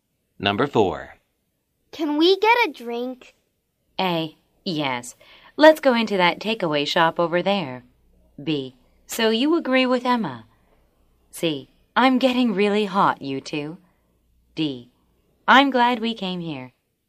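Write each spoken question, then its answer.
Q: Can we get a drink?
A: A: Yes. Let's go into that takeaway shop over there.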